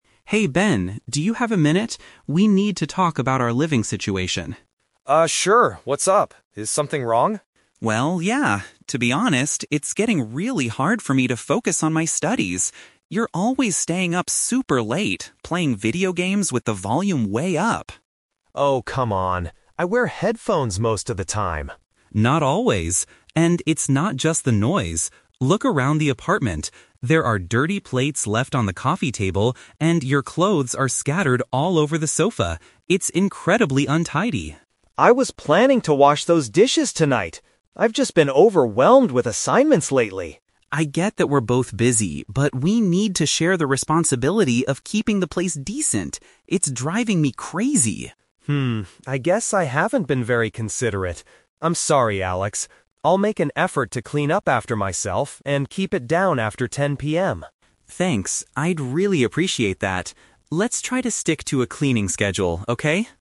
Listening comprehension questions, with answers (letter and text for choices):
Listen to a conversation between two roommates, Alex and Ben. For each question, choose the correct answer A, B, or (C).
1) Why is Alex mainly frustrated with Ben?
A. Ben never wears headphones when playing games.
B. Ben does not pay his share of the apartment bills.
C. Ben is messy and makes too much noise at night.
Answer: C. Ben is messy and makes too much noise at night.

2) What excuse does Ben give for the condition of the living room?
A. He has had too much university work to do.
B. He thought he already cleaned it up last night.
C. He believes the apartment is not actually that dirty.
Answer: A. He has had too much university work to do.

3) How do they agree to resolve their problem at the end?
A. By agreeing to stop playing video games entirely.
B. By following a regular routine for doing housework.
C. By asking the apartment manager to talk to Ben.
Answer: B. By following a regular routine for doing housework.

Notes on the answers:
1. Alex complains about Ben "playing video games with the volume way up" (noise) and leaving "dirty plates" and "clothes scattered" (being messy).
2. Ben says he is "overwhelmed with assignments lately." The phrase "overwhelmed with assignments" means having too much university work.
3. At the end, Alex suggests, "Let's try to stick to a cleaning schedule." A "cleaning schedule" is paraphrased in the answer as a "regular routine for doing housework."

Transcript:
Alex: Hey Ben, do you have a minute? We need to talk about our living situation.
Ben: Uh, sure. What's up? Is something wrong?
Alex: Well, yeah. To be honest, it's getting really hard for me to focus on my studies. You're always staying up super late, playing video games with the volume way up.
Ben: Oh, come on. I wear headphones most of the time!
Alex: Not always. And it's not just the noise. Look around the apartment. There are dirty plates left on the coffee table, and your clothes are scattered all over the sofa. It's incredibly untidy.
Ben: I was planning to wash those dishes tonight! I've just been overwhelmed with assignments lately.
Alex: I get that we're both busy, but we need to share the responsibility of keeping the place decent. It's driving me crazy.
I guess I haven't been very considerate. I'm sorry, Alex. I'll make an effort to clean up after myself and keep it down after 10 PM.
Alex: Thanks, I'd really appreciate that. Let's try to stick to a cleaning schedule, okay?